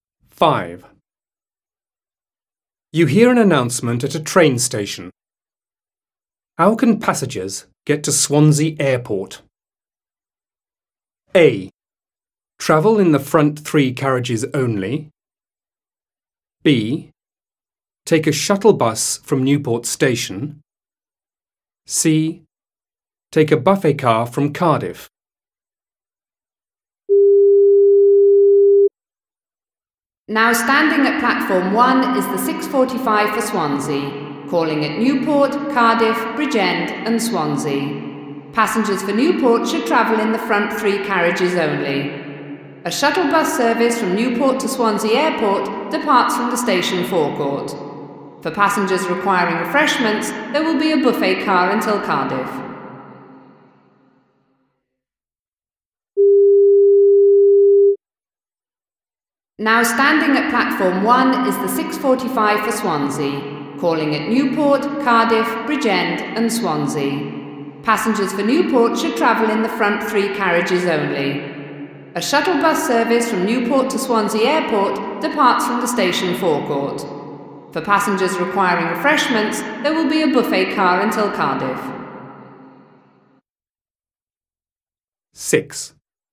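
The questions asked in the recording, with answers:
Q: How can passengers get to Swansea Airport?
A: B: Take a shuttle bus from Newport Station.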